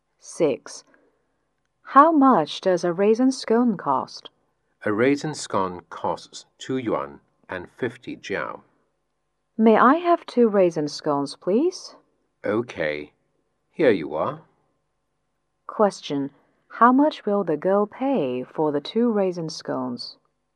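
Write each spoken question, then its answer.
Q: How much will the girl pay for the 2 raisin scones?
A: 5 yuan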